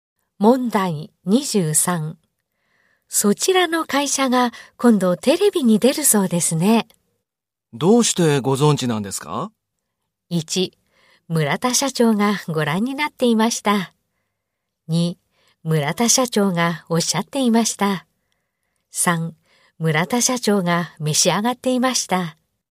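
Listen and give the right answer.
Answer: 2: 村田社長がおっしゃっていました。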